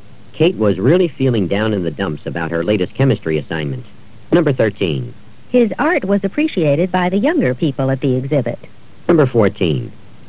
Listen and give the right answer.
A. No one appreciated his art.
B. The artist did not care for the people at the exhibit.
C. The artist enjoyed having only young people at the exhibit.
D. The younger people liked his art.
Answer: D. The younger people liked his art.

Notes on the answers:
His art was appreciated by the younger people at the exhibit.

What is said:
Kate was really feeling down in the dumps about her latest chemistry assignment.
13. His art was appreciated by the younger people at the exhibit.